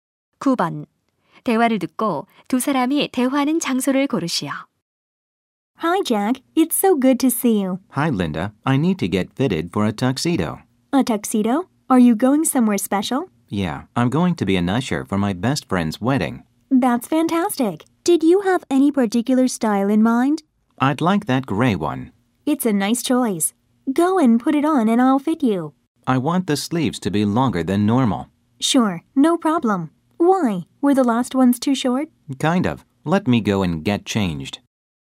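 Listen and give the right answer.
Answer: 턱시도 대여점(양복점)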